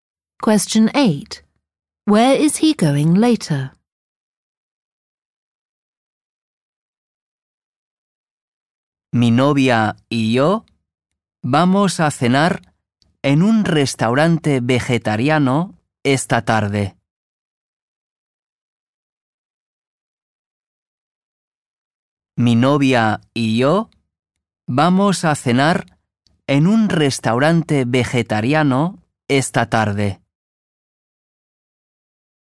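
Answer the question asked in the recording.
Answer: A vegetarian restaurant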